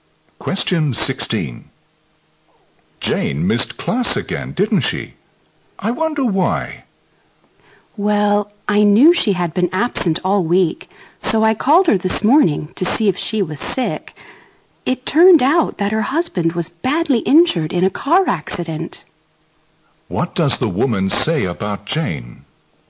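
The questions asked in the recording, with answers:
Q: What does the woman say about Jane?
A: Her husband was badly injured in a car accident.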